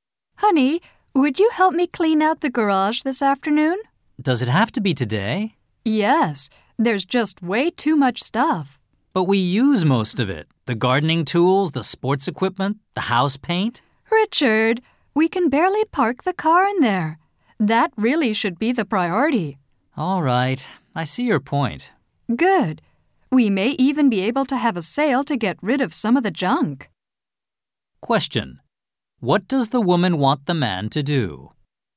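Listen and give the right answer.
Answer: Help her clean out the garage this afternoon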